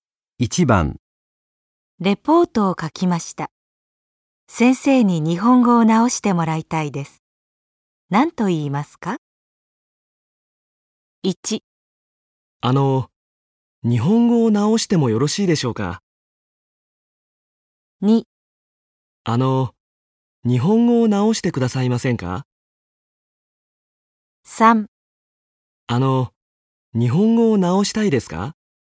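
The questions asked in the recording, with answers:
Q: 何と言いますか?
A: 2: 日本語を直してくださいませんか?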